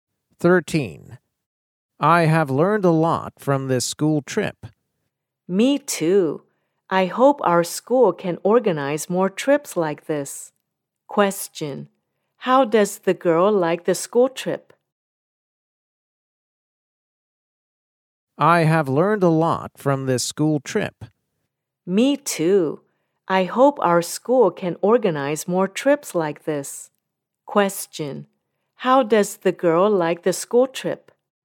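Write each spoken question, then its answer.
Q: How does the girl like the school trip?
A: She likes it; she learned a lot and wants more trips like it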